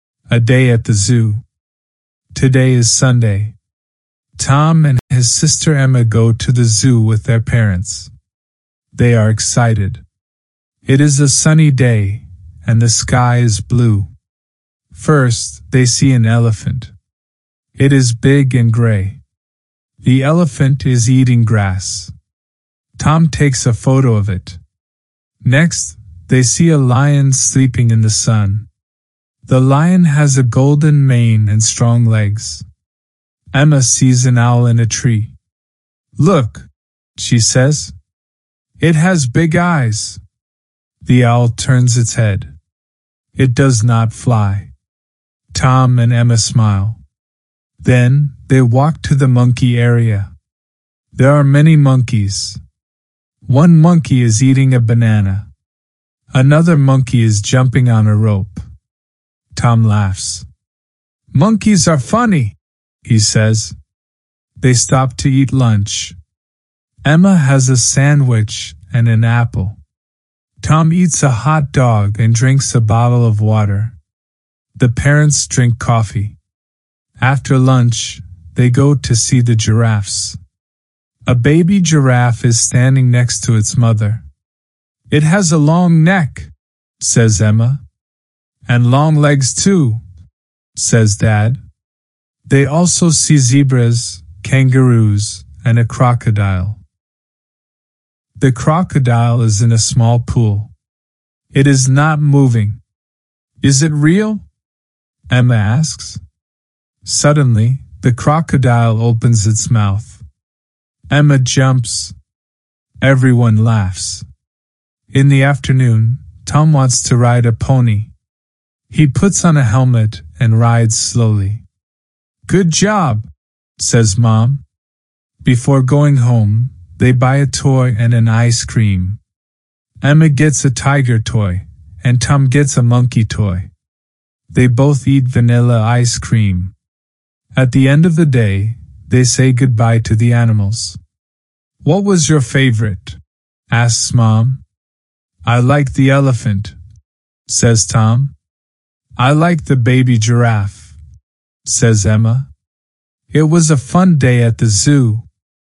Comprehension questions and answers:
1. Where do Tom and Emma go on Sunday?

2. What is the elephant doing when they see it?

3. What does the lion look like?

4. What is the owl doing?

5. What do Tom and Emma eat for lunch?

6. What animal surprises Emma?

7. What does Tom ride in the afternoon?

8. What toys do they buy?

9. What was Tom's favorite animal?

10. How does the family feel at the end of the day?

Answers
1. They go to the zoo with their parents.
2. The elephant is eating grass.
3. The lion has a golden mane and strong legs.
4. The owl is sitting in a tree and turns its head.
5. Emma eats a sandwich and an apple. Tom eats a hot dog and drinks water.
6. The crocodile surprises Emma when it suddenly opens its mouth.
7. Tom rides a pony.
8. Emma buys a tiger toy, and Tom buys a monkey toy.
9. Tom's favorite animal was the elephant.
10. They feel happy—it was a fun day at the zoo.